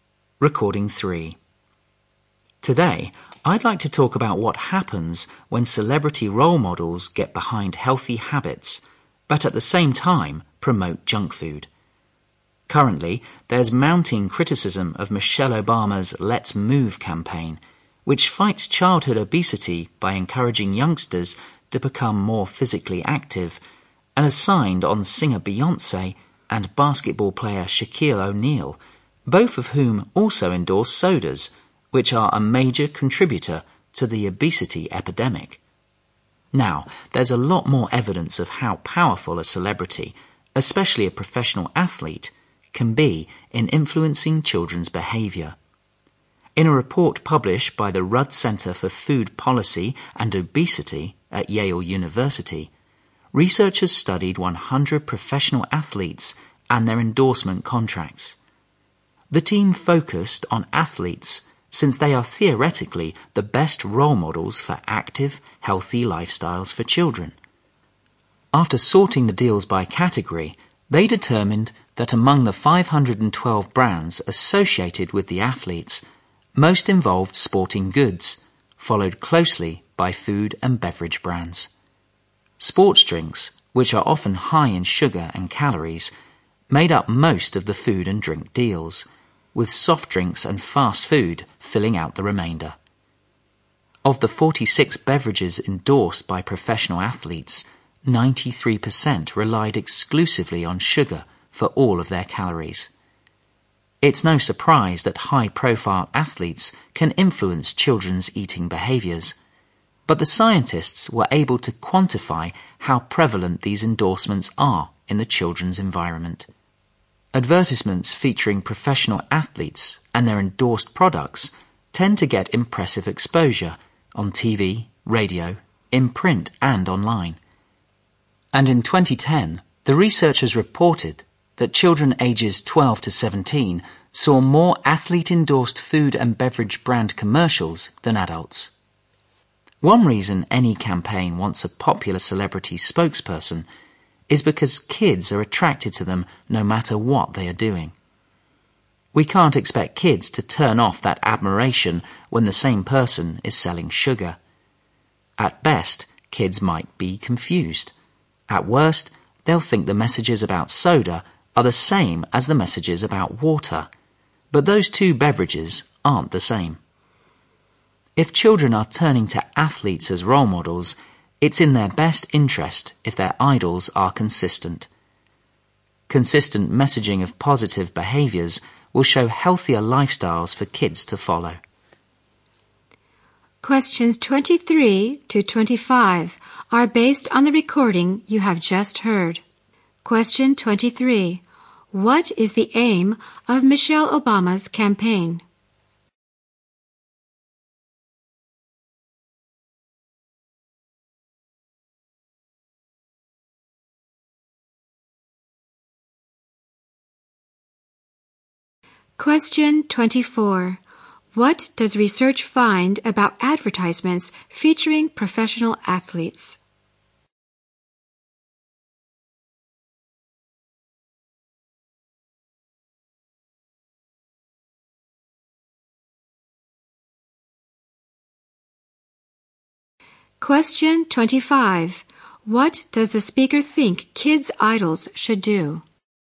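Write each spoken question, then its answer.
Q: What is the aim of Michelle Obama's campaign?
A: To fight childhood obesity by making children more active.

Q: What does the speaker think kids' idols should do?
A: Be consistent in promoting positive, healthy behaviour.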